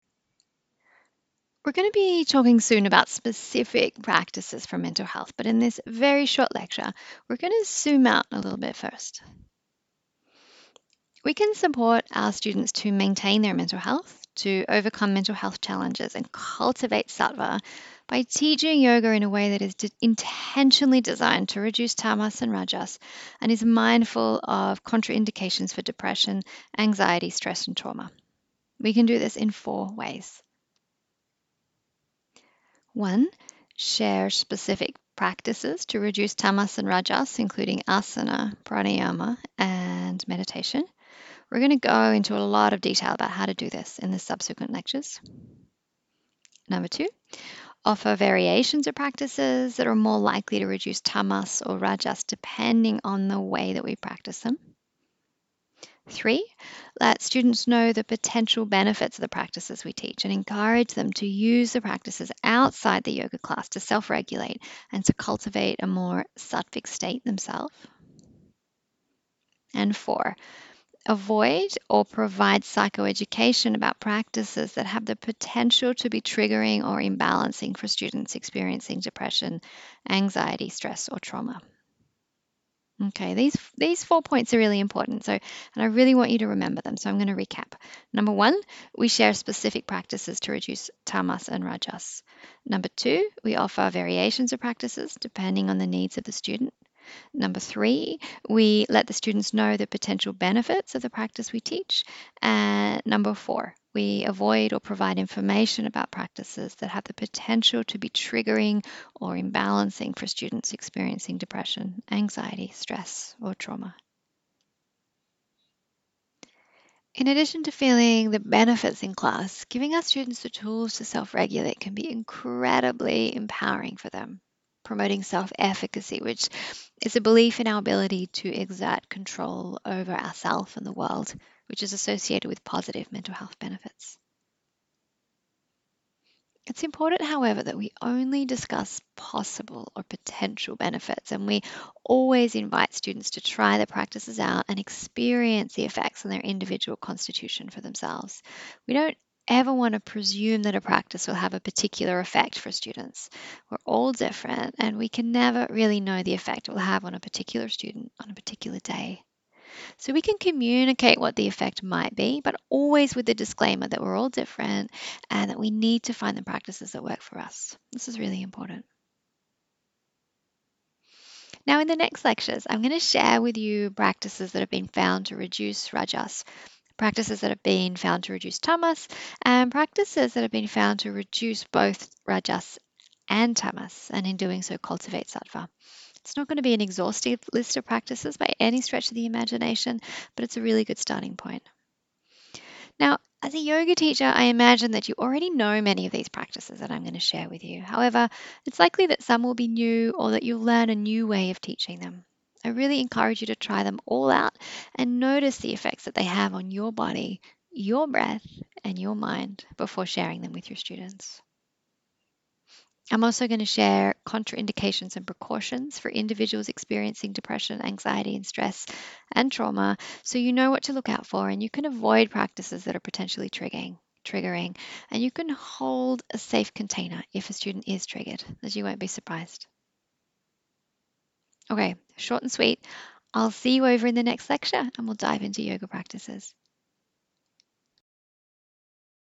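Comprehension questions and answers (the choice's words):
How might we support our students to cultivate sattva?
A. Teach practices and variations of practices that reduce tamas and rajas.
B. Let students know the potential benefits of the practices and encourage them to use the practices outside the class to self-regulate.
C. Avoid or provide psychoeducation about practices that have the potential to be triggering or imbalancing.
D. All of the above.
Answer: All of the above.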